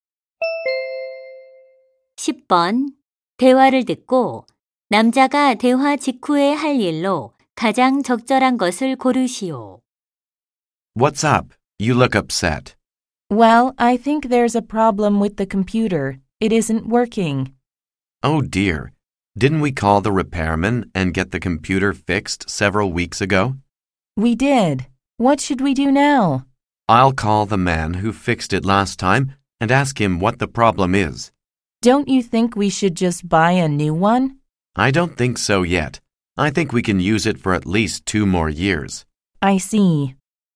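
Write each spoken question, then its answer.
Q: 대화를 듣고 남자가 대화 직후에 할 일로 가장 적절한 것을 고르시오.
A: 지난번 컴퓨터 수리 기사에게 전화하기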